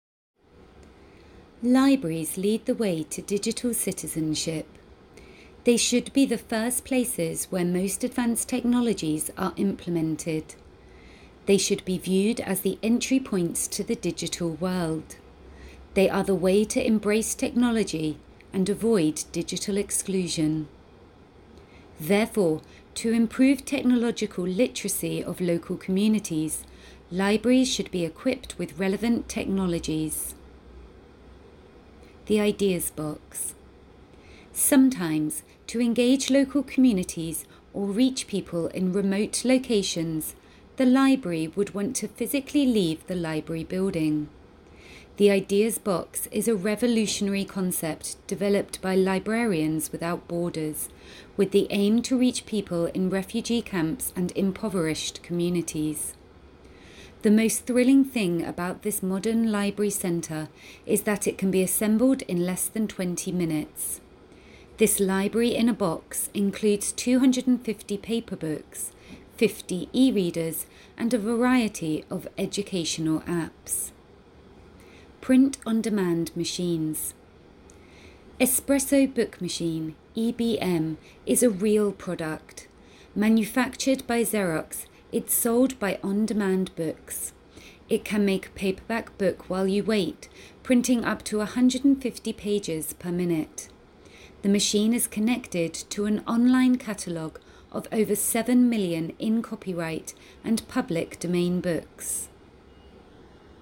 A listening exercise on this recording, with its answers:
Listen to the audio clip and complete the following sentences. In each answer, you must give no more than 3 words and/or a number.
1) Libraries are an entrance to the ___________.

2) To improve the technological ability of local societies, libraries should be supplied with __________.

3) __________ the library itself needs to leave the physical library building.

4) The Ideas Box will take the library to people in refugee camps and __________ societies.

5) __________ paper books are included in the Ideas Box library.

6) The Espresso Book Machine is sold by ___________.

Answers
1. DIGITAL WORLD
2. RELEVANT TECHNOLOGIES
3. SOMETIMES
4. IMPOVERISHED
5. 250
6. ON DEMAND BOOKS

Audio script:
Libraries lead the way to digital citizenship. They should be the first places where most advanced technologies are implemented. They should be viewed as the entry points to the digital world. They are the way to embrace technology and avoid digital exclusion.
Therefore, to improve technological literacy of local communities, libraries should be equipped with relevant technologies.
The Ideas Box
Sometimes, to engage local communities, or reach people in remote locations, the library would want to physically leave the library building.
The Ideas Box is a revolutionary concept developed by Librarians Without Borders, with the aim to reach people in refugee camps and impoverished communities.
The most thrilling thing about this modern library center is that it can be assembled in less than 20 minutes. This library in a box includes 250 paper books, 50 e-readers, and a variety of educational apps.
Print On Demand Machines
Espresso Book Machine (EBM) is a real product. Manufactured by Xerox, it's sold by On Demand Books. It can make a paperback book while you wait, printing up to 150 pages per minute.
The machine is connected to an online catalog of over seven million in-copyright and public domain books.